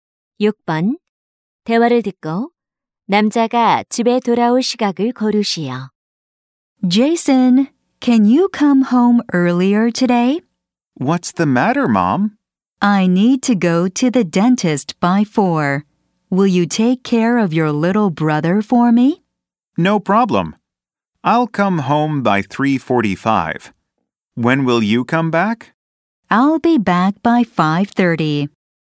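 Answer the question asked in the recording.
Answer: 3시 45분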